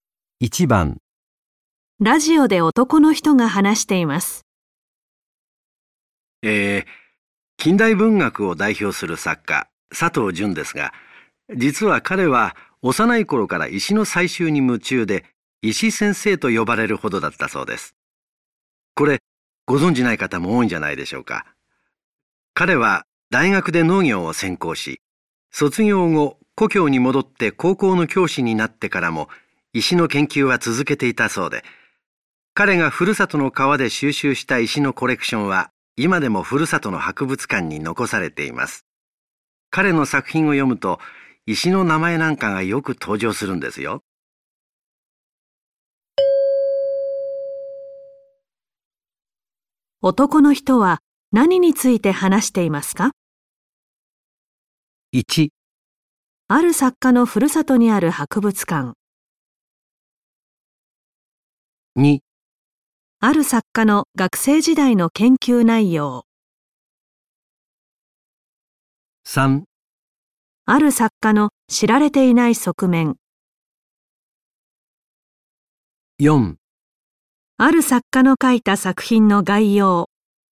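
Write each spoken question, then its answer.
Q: 男の人は何について話していますか?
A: 3: ある作家の知られていない側面。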